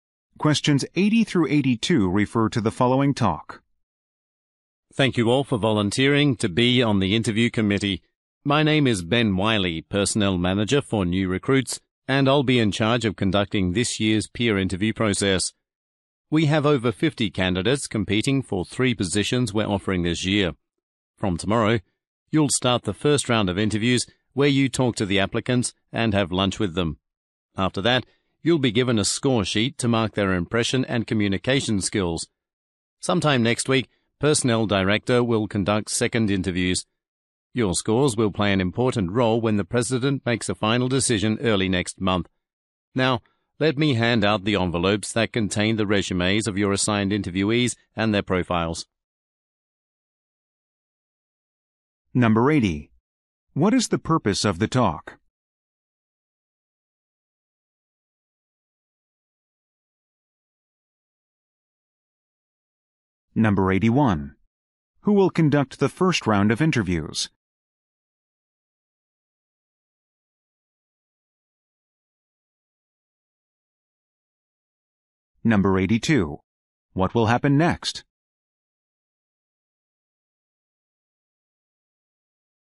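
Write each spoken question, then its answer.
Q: What is the purpose of the talk?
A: To explain the peer interview process to the committee

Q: Who will conduct the first round of interviews?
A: The volunteers on the interview committee

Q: What will happen next?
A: Envelopes with the interviewees' resumes will be handed out.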